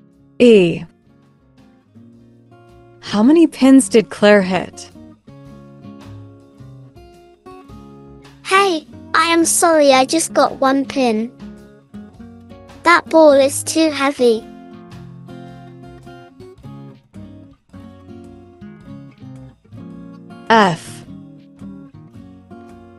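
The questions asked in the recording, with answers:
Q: How many pins did Claire hit?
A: One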